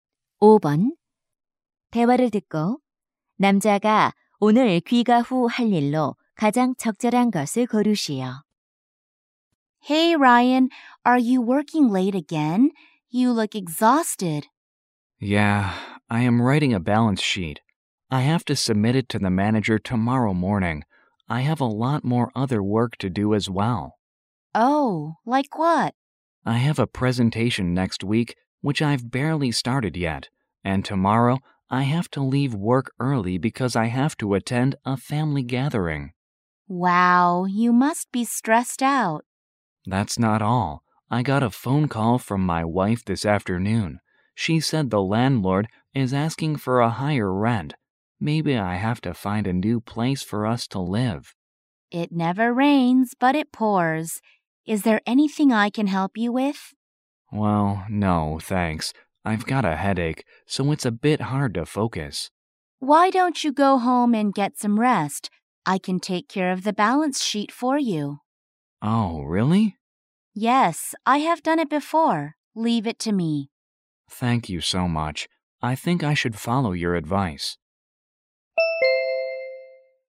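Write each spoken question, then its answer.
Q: 대화를 듣고 남자가 오늘 귀가 후 할 일로 가장 적절한 것을 고르시오.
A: 휴식 취하기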